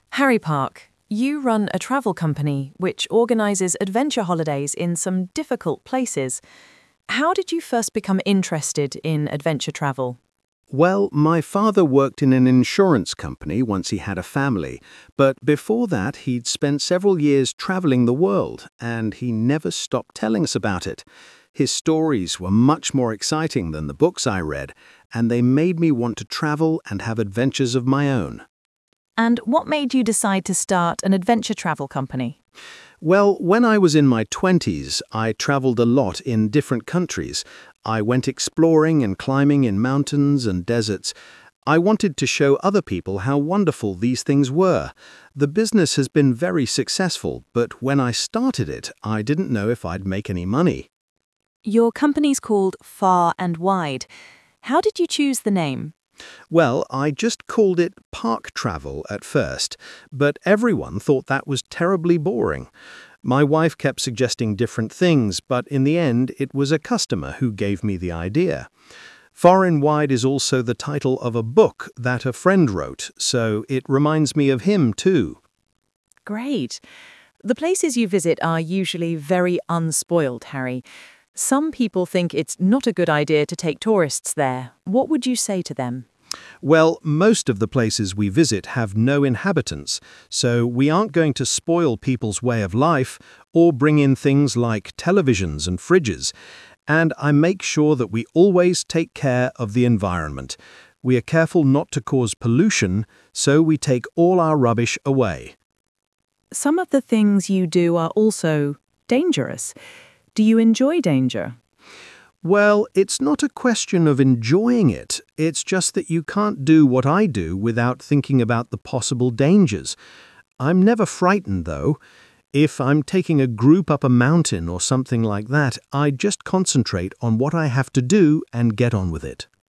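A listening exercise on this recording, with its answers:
Conversation 2:You will hear a radio interview with a man named Harry Park, who talks about the adventure travel company he runs.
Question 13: Why did Harry first become interested in adventure travel?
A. His father talked a lot about the places he'd been to.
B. His father gave him adventure stories to read.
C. His father worked in a travel company.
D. His father spent several years travelling around the world.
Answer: A. His father talked a lot about the places he'd been to.

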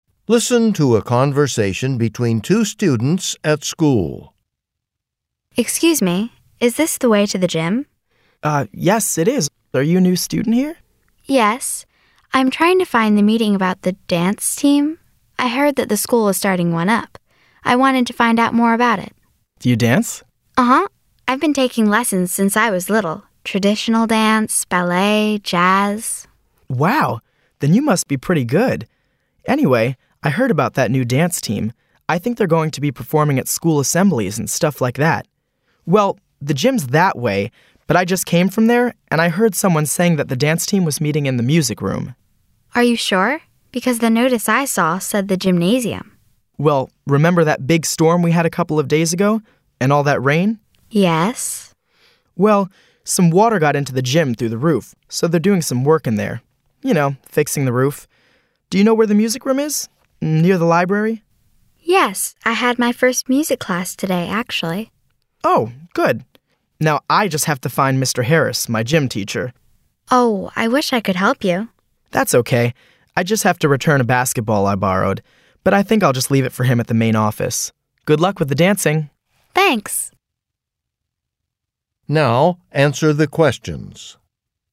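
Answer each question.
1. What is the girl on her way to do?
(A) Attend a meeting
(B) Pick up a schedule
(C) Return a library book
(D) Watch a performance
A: (A) Attend a meeting

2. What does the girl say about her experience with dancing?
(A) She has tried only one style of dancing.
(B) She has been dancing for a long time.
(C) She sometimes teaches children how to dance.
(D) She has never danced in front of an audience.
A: (B) She has been dancing for a long time.

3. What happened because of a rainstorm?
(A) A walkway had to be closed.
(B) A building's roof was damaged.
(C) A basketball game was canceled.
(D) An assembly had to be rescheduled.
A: (B) A building's roof was damaged.

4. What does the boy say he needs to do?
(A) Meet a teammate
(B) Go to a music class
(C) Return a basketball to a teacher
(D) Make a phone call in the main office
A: (C) Return a basketball to a teacher

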